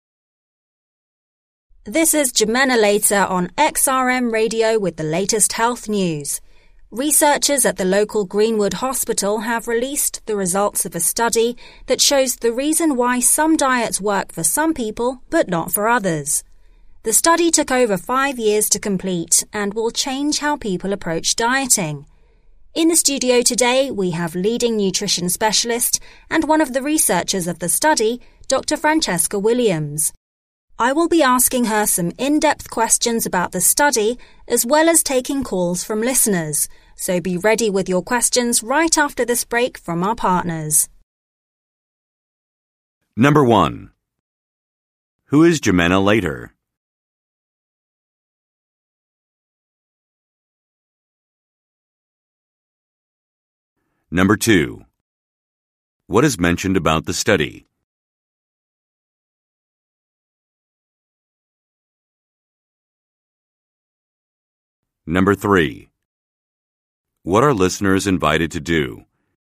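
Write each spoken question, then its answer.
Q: Who is Jimena Later?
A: A radio host for health news on XRM Radio

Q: What are listeners invited to do?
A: Call in with questions for Dr. Williams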